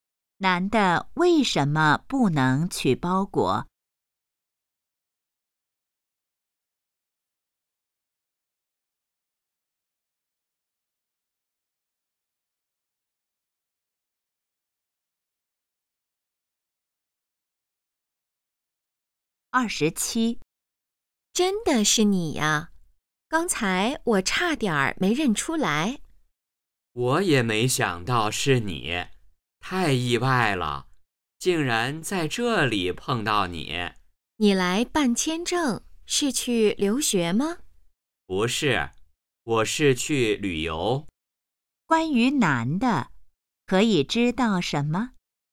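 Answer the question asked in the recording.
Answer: 要去旅游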